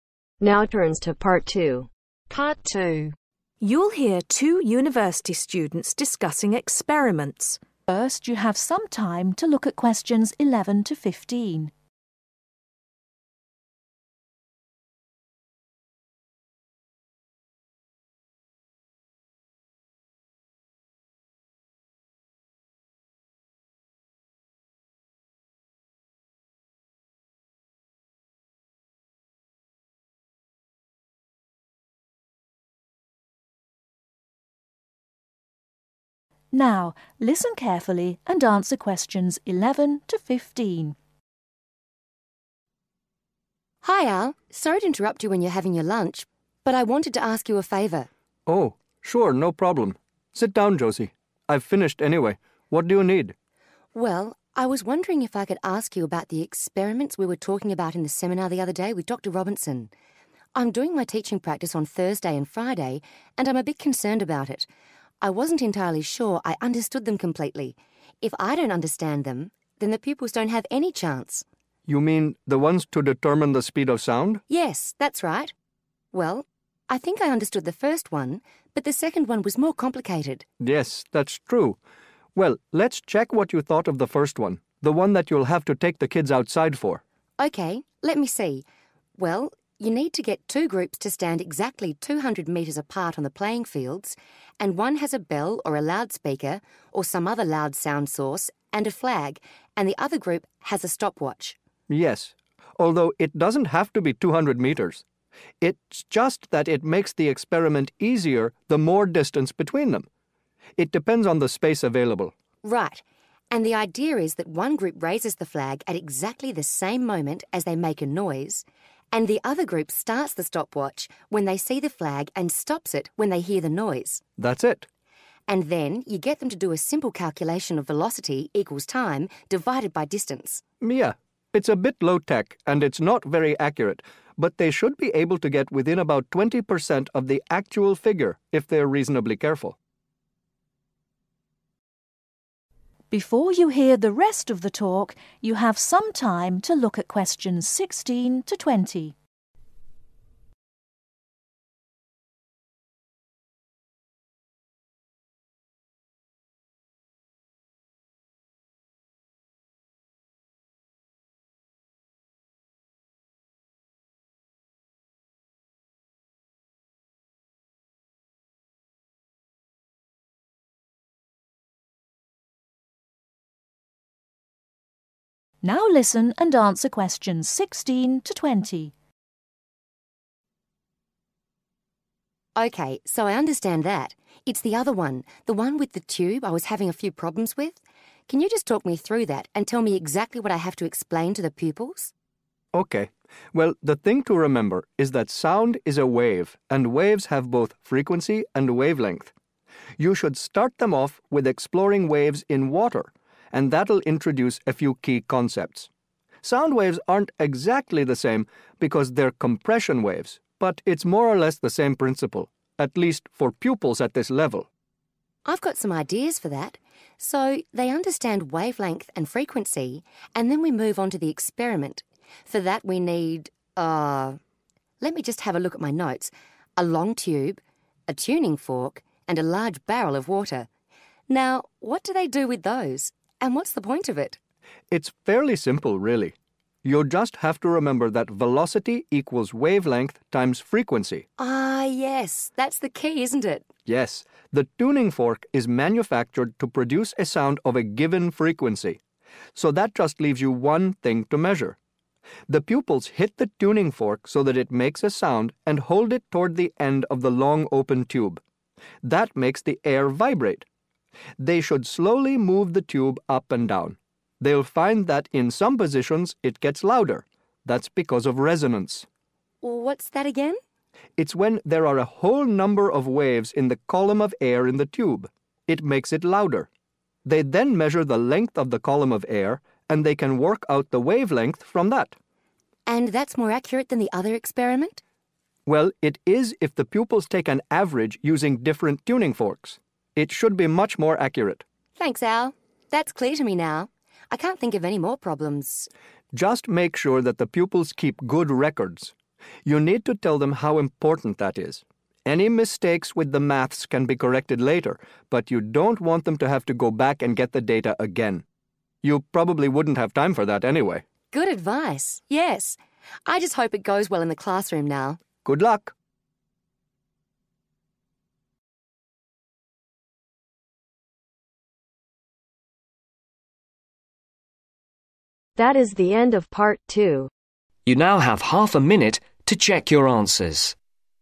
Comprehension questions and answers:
Complete the sentences below. Write NO MORE THAN TWO WORDS AND/OR A NUMBER for each answer.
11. Josie is concerned about her ............ later this week.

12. The purpose of the experiments is too measure the speed of ............ .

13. The first experiment needs to be done ............ because of the distances involved.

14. In this experiment, some pupils have a stopwatch and the others have a loud ............, such as a bell.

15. The results of the experiment should be accurate to within approximately ............ .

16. In preparation of the second experiment, pupils should understand the fundamental ideas of frequency and (16)............ .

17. pupils then hit a tuning fork near the end of a (17)............ immersed in a barrel of water.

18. At some point, the sound (18)............ due to the resonance of the wave.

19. What should pupil do with their results to increase the accuracy of the experiment ?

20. What should Josie encourage her pupils to do during the experiments ?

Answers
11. Teaching practice
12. sound
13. outside
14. sound source
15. 20%
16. wavelength
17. (long) tube
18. gets louder
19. take average
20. keep records